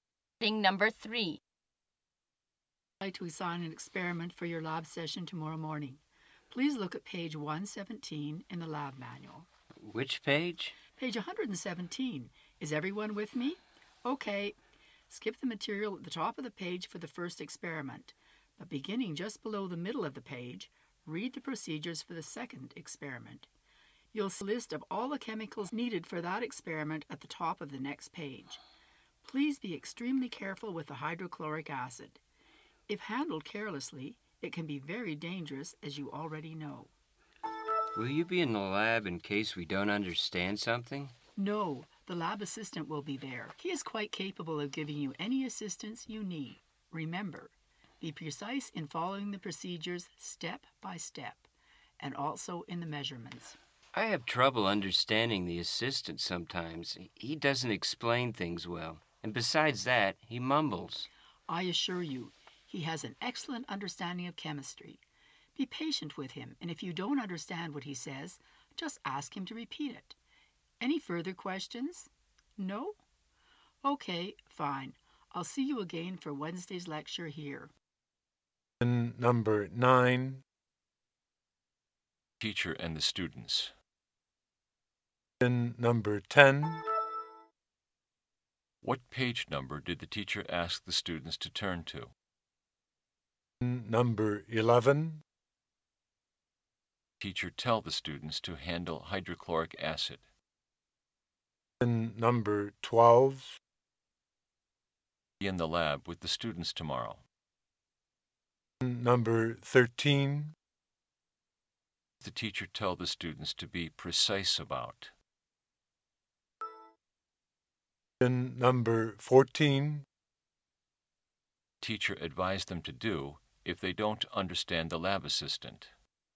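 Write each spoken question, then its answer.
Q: What page number did the teacher ask the students to turn to?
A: Page 117

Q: Teacher tell the students to handle hydrochloric acid.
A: Extremely carefully

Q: The teacher tell the students to be precise about.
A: Following the procedures step by step and the measurements

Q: Teacher advise them to do if they don't understand the lab assistant.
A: Be patient and ask him to repeat it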